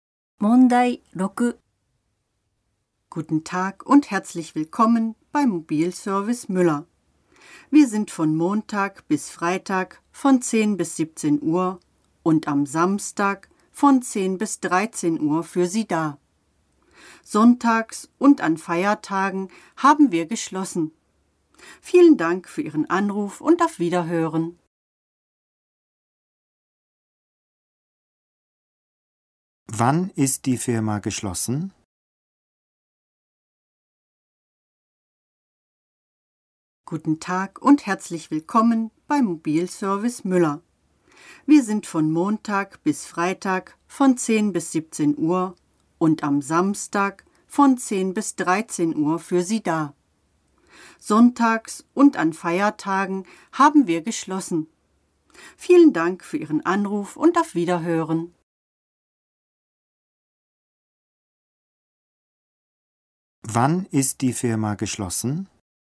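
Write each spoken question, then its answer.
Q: Wann ist die Firma geschlossen?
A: Sonntags und an Feiertagen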